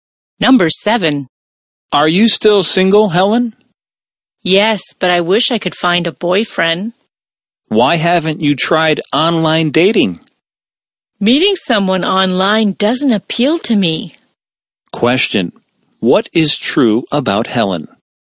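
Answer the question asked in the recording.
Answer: She is single and online dating doesn't appeal to her.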